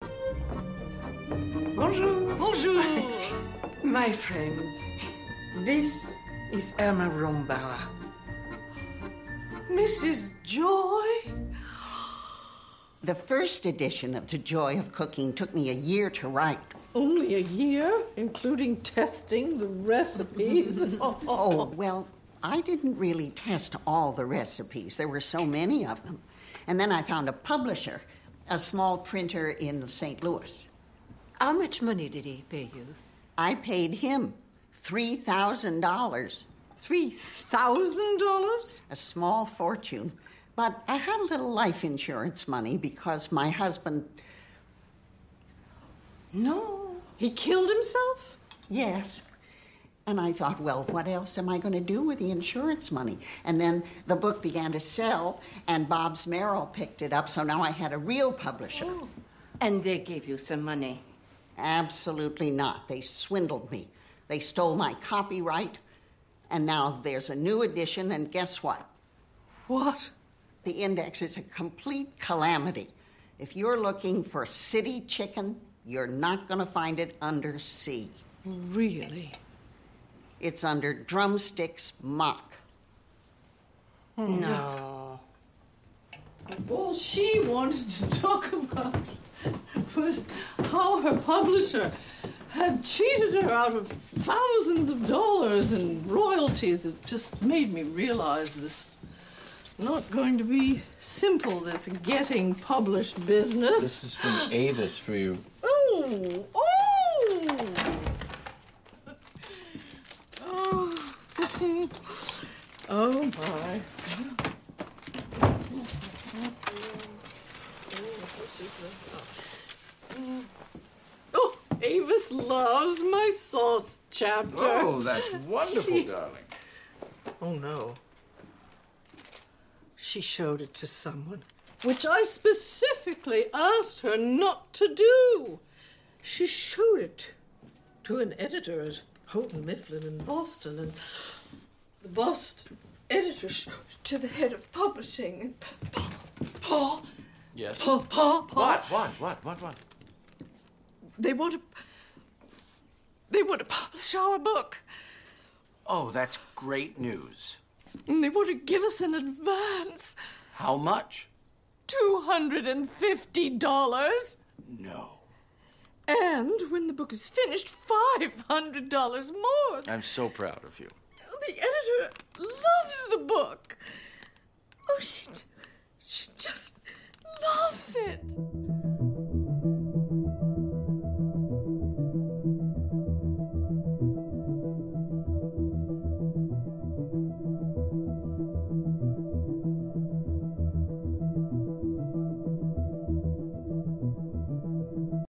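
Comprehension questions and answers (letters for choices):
Прослушайте аудиоотрывок из фильма Julie & Julia («Джули и Джулия: Готовим счастье по рецепту») и ответьте на вопросы.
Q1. Who is Mrs Joy?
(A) She is a cookbook author.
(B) She is a well-known publisher.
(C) She is a famous novelist.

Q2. Which statement about Mrs Joy's book is true?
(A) It took her a year to write the first edition.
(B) She tested all the recipes from her book.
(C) She published the book for free.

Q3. What happened to Mrs Joy's husband?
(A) He killed himself.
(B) He was killed.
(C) He died in an accident.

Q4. Which statement about Mrs Joy is false?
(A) Her book failed.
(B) She spent some life insurance money on her book.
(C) The second publisher stole her copyright.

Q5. What's wrong with the new edition of Mrs Joy's book?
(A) The index is confusing.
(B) They added some new recipes.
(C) There's no recipe for City Chicken.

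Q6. What does Julia say to her husband?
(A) It's not easy to get published.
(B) She knows that publishers will cheat her out of thousands of dollars.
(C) She doesn't need a publisher.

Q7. What does Julia learn from the letter she got?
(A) Her friend showed Julia's book to an editor.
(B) Her friend doesn't like the chapter about sauces.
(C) Her friend found a publisher in London.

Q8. How much does the publisher want to pay as an advance?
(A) $250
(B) $2500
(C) $215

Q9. How much money will Julia get in total?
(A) $750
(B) $500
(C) $250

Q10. How does Julia's husband feel about the situation?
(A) He is proud of his wife.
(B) He is not happy with the sum of money they're offered.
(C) He is worried about his wife.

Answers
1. A
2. A
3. A
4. A
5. A
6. A
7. A
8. A
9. A
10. A

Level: Pre-intermediate (A2)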